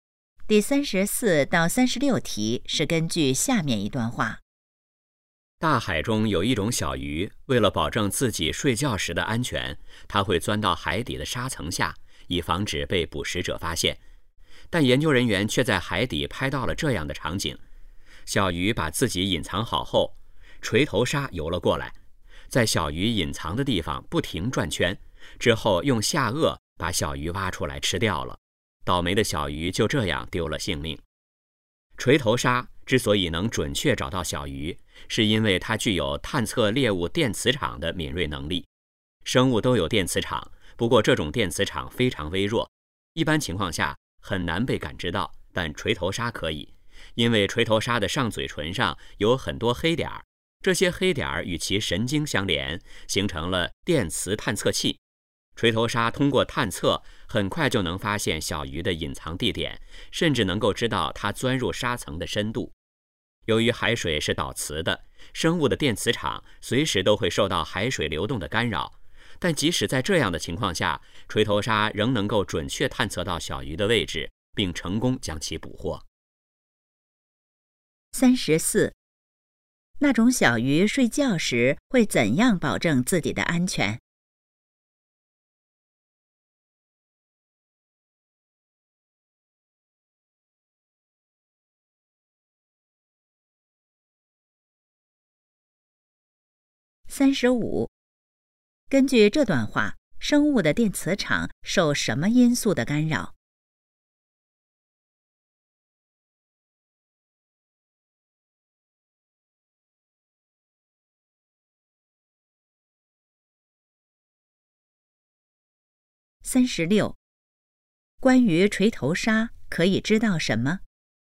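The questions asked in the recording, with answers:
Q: 那种小鱼睡觉时会怎样保证自己的安全?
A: 钻到海底的沙层下

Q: 根据这段话,生物的电磁场受什么因素的干扰?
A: 海水流动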